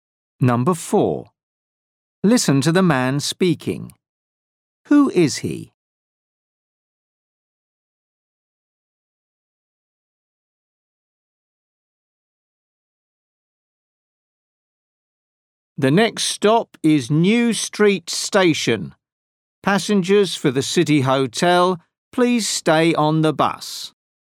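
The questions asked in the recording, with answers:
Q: Who is he?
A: a bus driver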